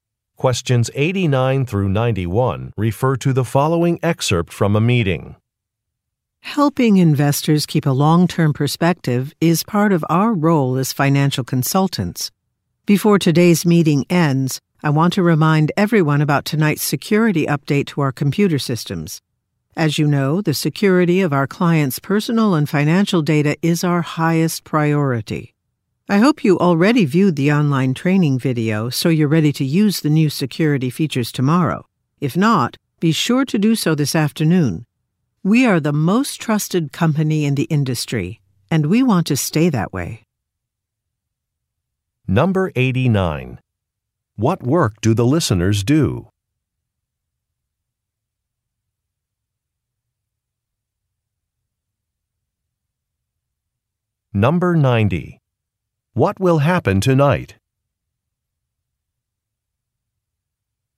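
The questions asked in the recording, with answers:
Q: What work do the listeners do?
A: Financial consulting

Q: What will happen tonight?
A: A security update to the computer systems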